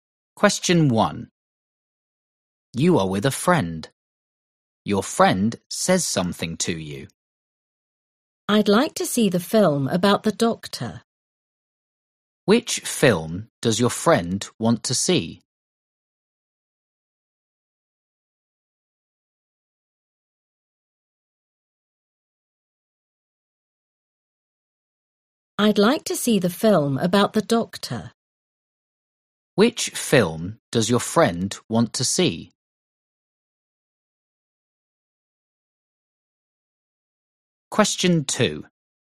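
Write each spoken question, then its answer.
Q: Which film does your friend want to see?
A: The film about the doctor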